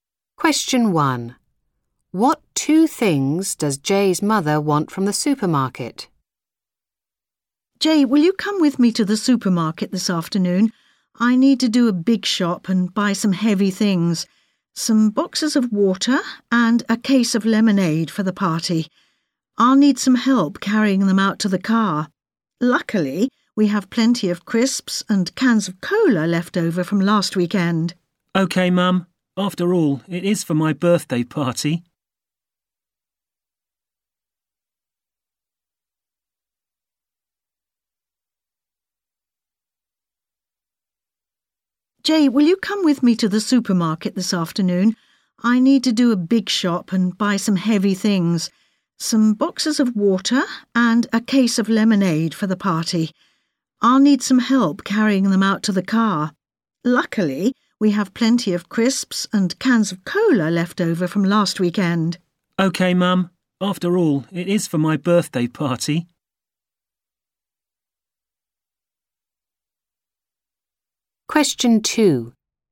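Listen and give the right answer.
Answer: Boxes of water and a case of lemonade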